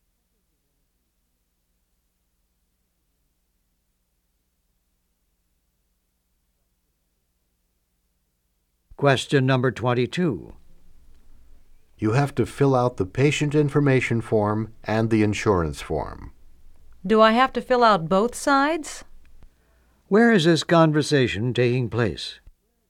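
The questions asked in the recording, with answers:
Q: Where is this conversation taking place?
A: At a doctor's office.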